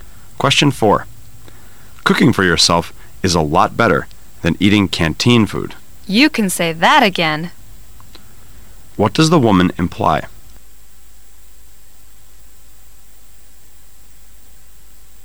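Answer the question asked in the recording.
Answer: She agrees that cooking for yourself is better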